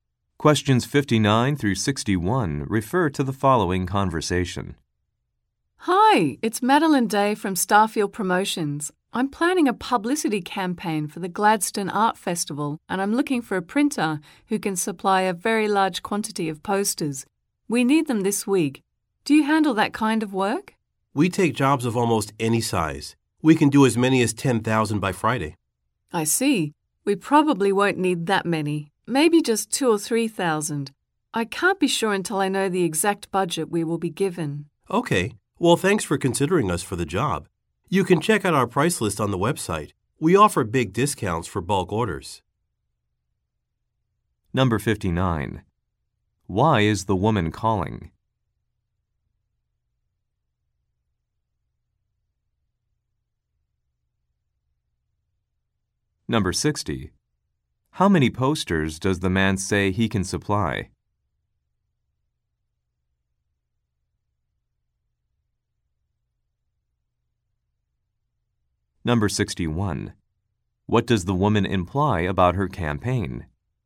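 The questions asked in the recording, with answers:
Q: Why is the woman calling?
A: To find a printer for a large number of posters

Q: How many posters does the man say he can supply?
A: 10,000

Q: What does the woman imply about her campaign?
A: Its budget has not been decided yet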